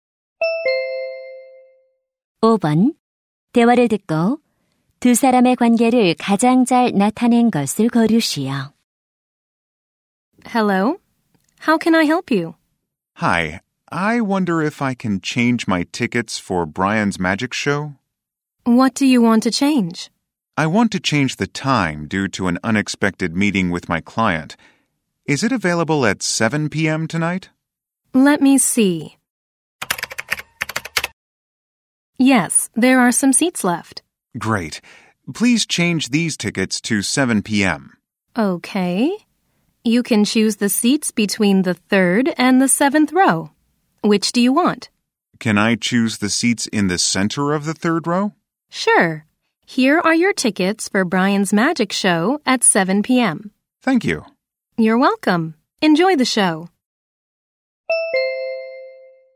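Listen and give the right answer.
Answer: 매표소 직원 - 관객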